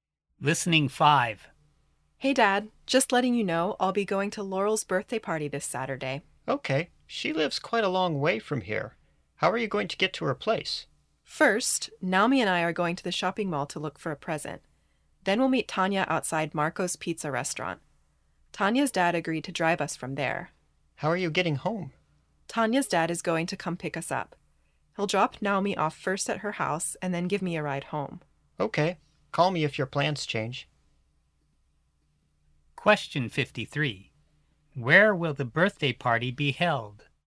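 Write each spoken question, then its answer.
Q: Where will the birthday party be held?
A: At Laurel's house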